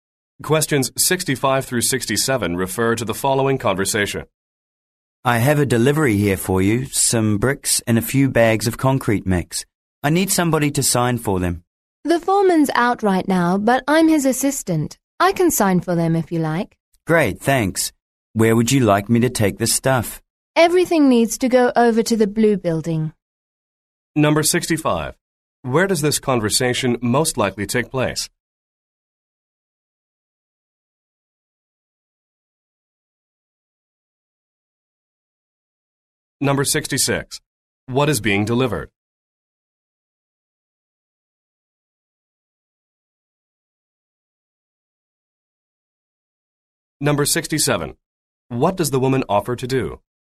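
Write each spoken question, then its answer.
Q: What is being delivered?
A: Bricks and concrete mix

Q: What does the woman offer to do?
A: Sign for the delivery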